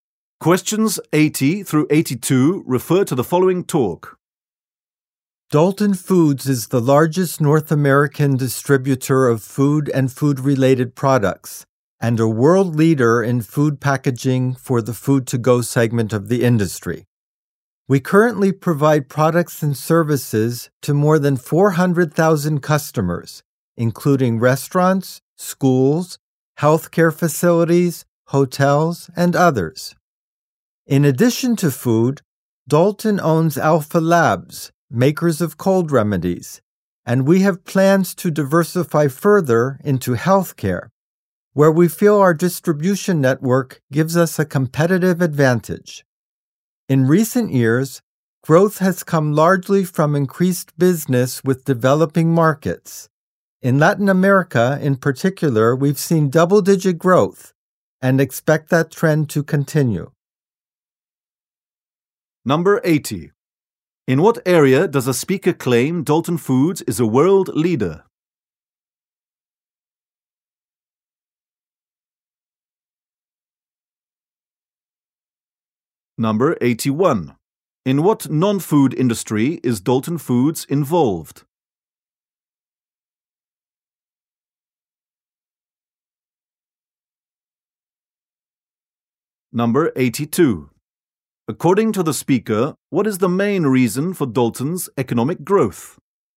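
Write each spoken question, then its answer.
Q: In what area does a speaker claim Dalton Foods is a world leader?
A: Food packaging for the food-to-go segment

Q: In what non-food industry is Dalton Foods involved?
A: Healthcare (cold remedies)

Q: According to the speaker, what is the main reason for Dalton's economic growth?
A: Increased business with developing markets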